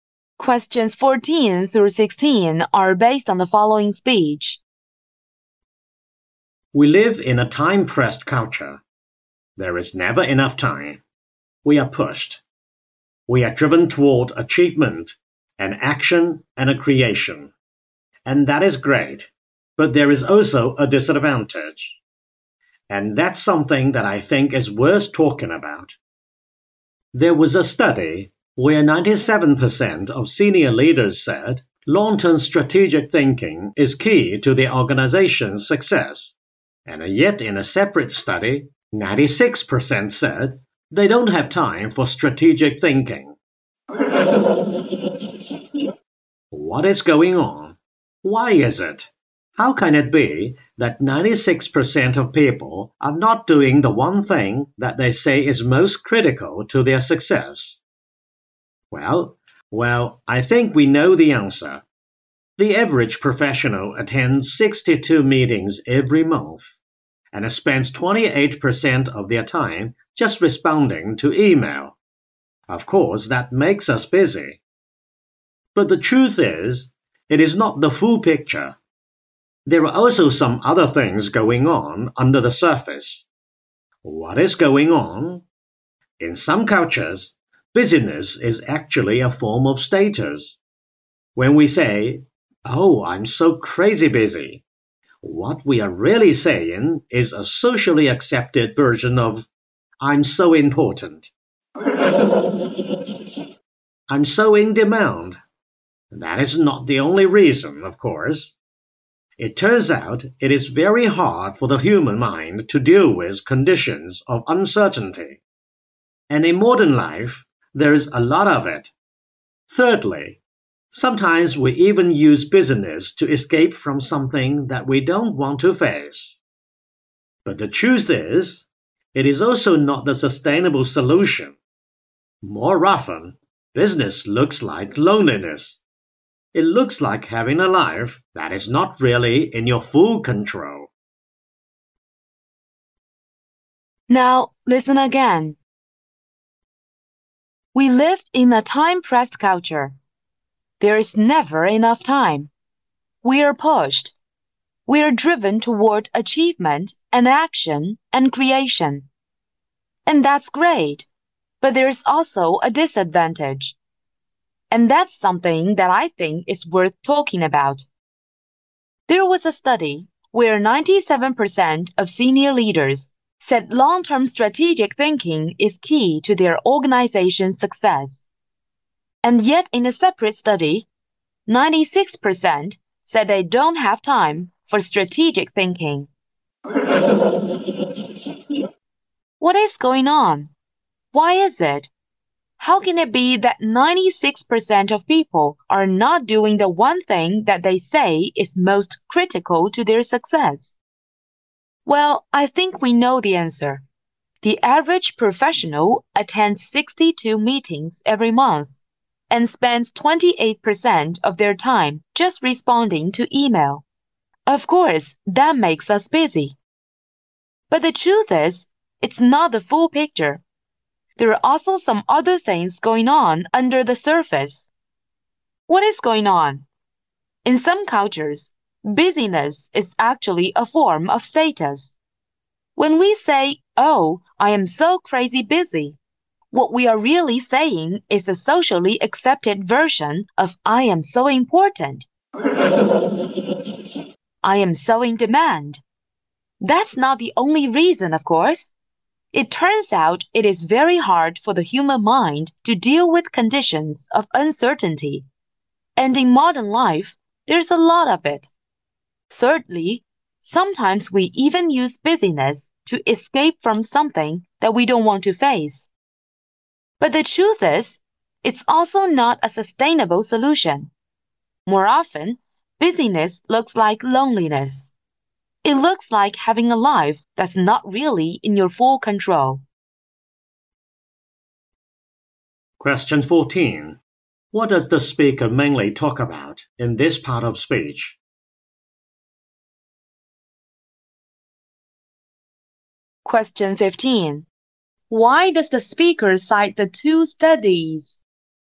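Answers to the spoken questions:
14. Why people are so busy
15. To show that people value strategic thinking but say they are too busy for it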